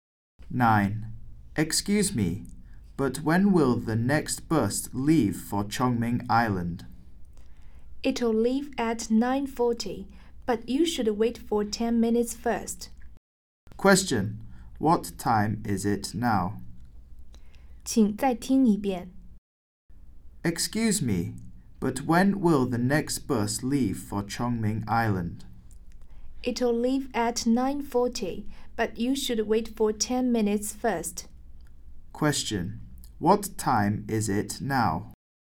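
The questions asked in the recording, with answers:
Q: What time is it now?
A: 9:30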